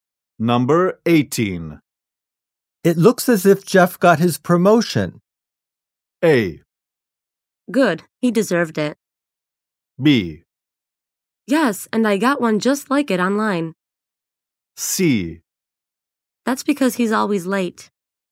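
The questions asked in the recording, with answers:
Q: It looks as if Jeff got his promotion.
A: A: Good, he deserved it.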